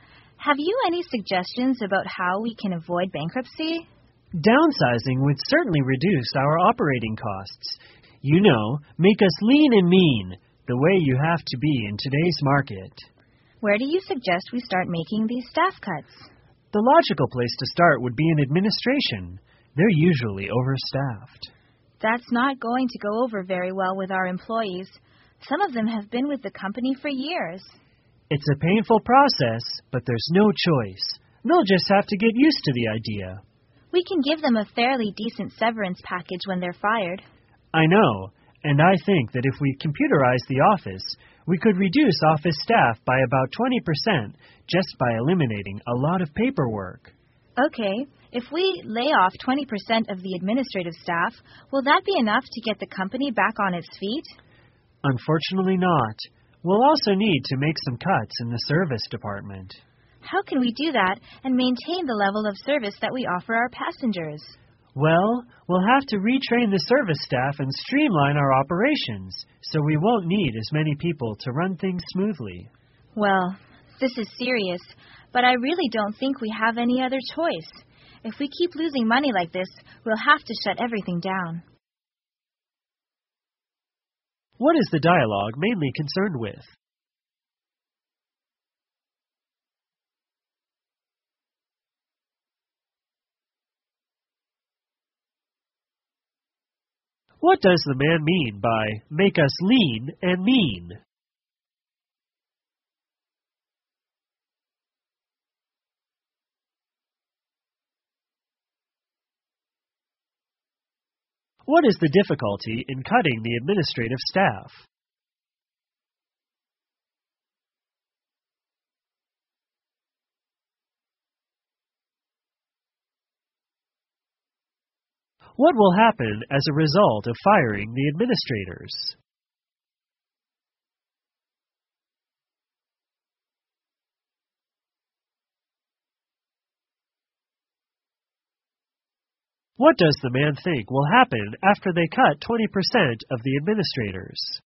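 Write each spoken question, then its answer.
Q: What is the dialogue mainly concerned with?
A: Cutting staff (downsizing) to keep the company from going bankrupt

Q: What does the man mean by make us lean and mean?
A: Making the company smaller and more efficient by cutting staff and operating costs

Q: What is the difficulty in cutting the administrative staff?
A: The employees won't like it, because some have been with the company for years

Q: What does the man think will happen after they cut 20% of the administrators?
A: It won't be enough to save the company, so they will also have to cut the service department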